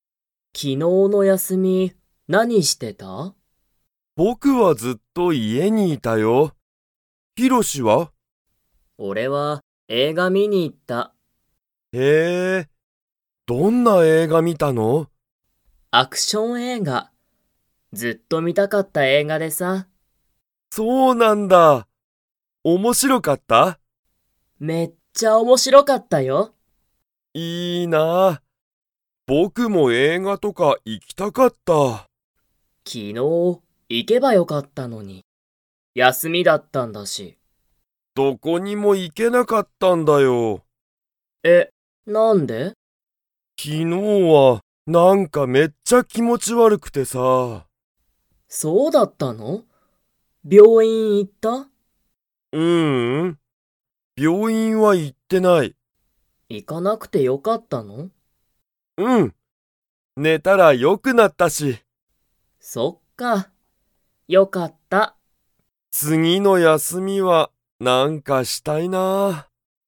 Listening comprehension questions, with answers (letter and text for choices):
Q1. ヒロシは昨日(きのう)、____。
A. 家(いえ)で映画(えいが)を観(み)た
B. シゲルと一緒(いっしょ)に遊(あそ)んだ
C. 映画(えいが)を観(み)に行(い)った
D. 家(いえ)で寝(ね)ていた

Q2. シゲルは昨日(きのう)、病院(びょういん)に行(い)きましたか?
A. はい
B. いいえ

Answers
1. C. 映画(えいが)を観(み)に行(い)った
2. B. いいえ

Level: Level 2